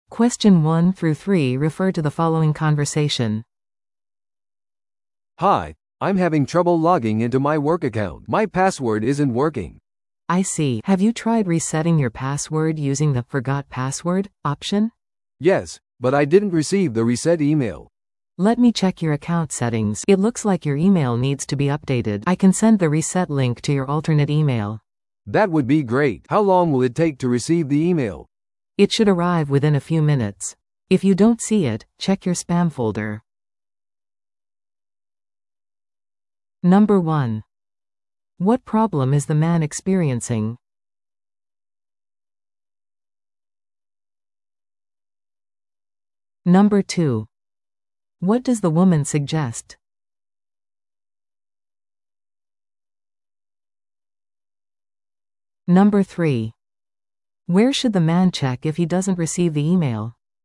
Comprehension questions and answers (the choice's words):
Listen to the audio below and answer the questions.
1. What problem is the man experiencing?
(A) パソコンの電源が入らない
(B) インターネットに接続できない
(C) 会社のアカウントにログインできない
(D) メールが送信できない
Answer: 会社のアカウントにログインできない

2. What does the woman suggest?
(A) パソコンを再起動する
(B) 別のインターネット接続を試す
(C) パスワードをリセットする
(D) 別のメールを使用する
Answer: パスワードをリセットする

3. Where should the man check if he doesn't receive the email?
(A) 迷惑メールフォルダ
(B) 仕事用のパソコン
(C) ITマネージャーの受信トレイ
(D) 携帯電話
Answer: 迷惑メールフォルダ

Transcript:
A: "Hi, I'm having trouble logging into my work account. My password isn't working."
B: "I see. Have you tried resetting your password using the 'Forgot Password' option?"
A: "Yes, but I didn't receive the reset email."
B: "Let me check your account settings. It looks like your email needs to be updated. I can send the reset link to your alternate email."
A: "That would be great. How long will it take to receive the email?"
B: "It should arrive within a few minutes. If you don't see it, check your spam folder."